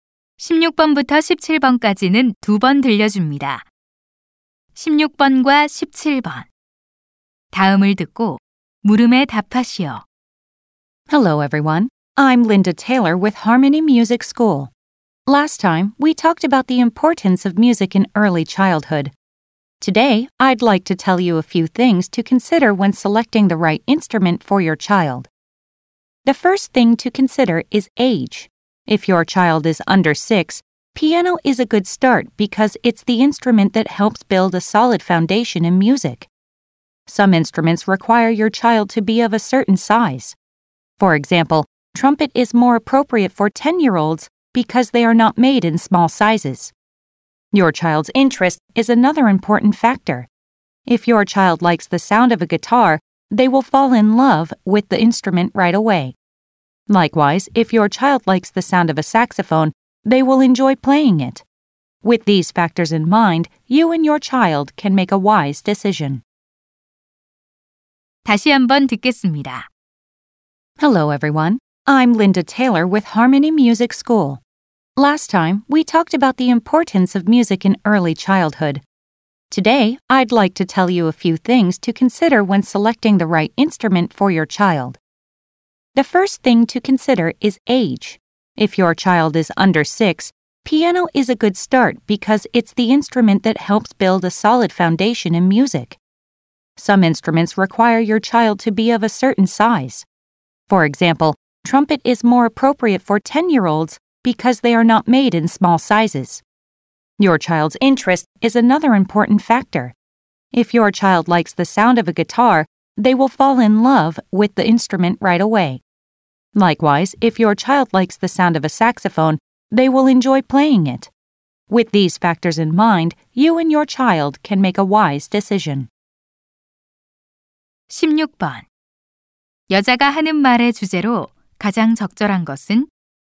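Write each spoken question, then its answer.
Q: 여자가 하는 말의 주제로 가장 적절한 것은?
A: 아이에게 맞는 악기를 고를 때 고려할 점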